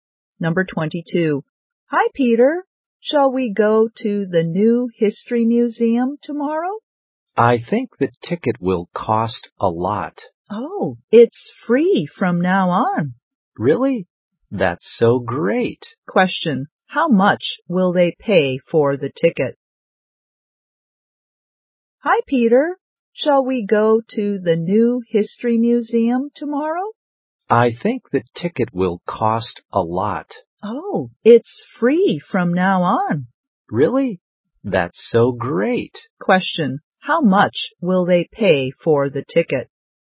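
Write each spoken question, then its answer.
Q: How much will they pay for the ticket?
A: Nothing, it's free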